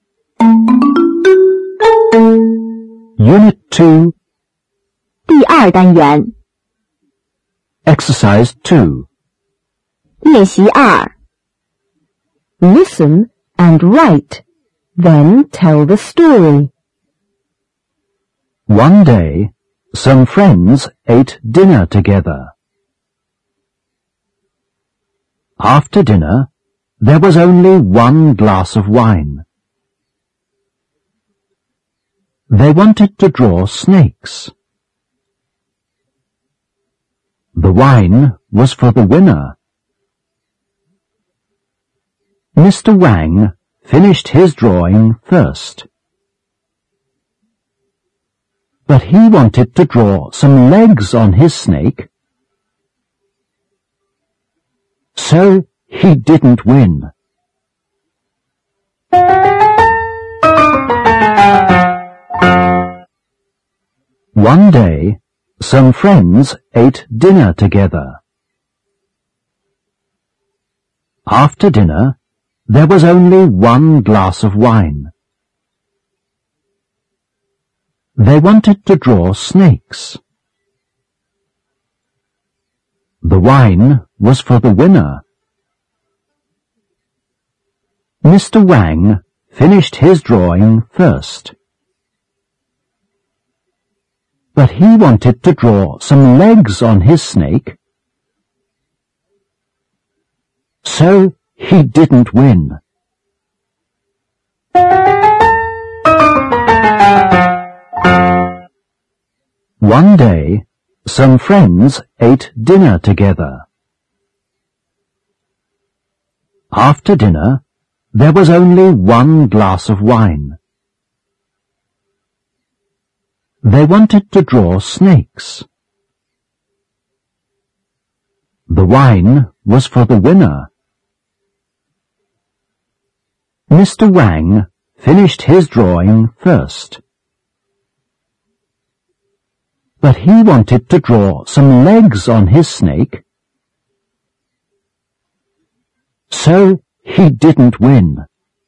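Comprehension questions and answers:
2. Listen and write . Then tell the story.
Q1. One day , some friends ________ dinner together.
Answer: ate

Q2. After dinner, there ____ only one glass of wine .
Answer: was

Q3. They _____to draw snakes.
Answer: wanted

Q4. The wine __ for the winner.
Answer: was

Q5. Mr Mang ______ his drawing first.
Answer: finished

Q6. But he _______to Draw some legs on his snake .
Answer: wanted

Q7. So, he ____ win!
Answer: didn't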